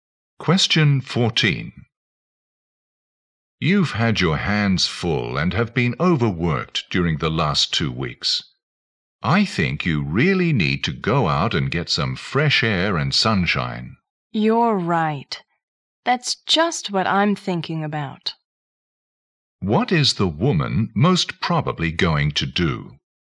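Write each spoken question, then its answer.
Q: What is the woman most probably going to do?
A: Go out for some fresh air and sunshine.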